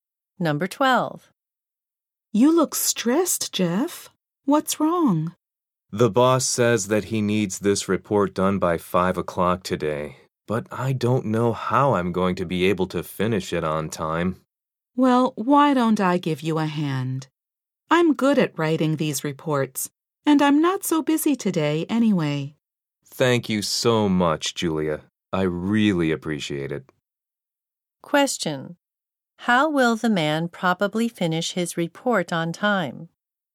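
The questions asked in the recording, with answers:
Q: How will the man probably finish his report on time?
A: Julia will help him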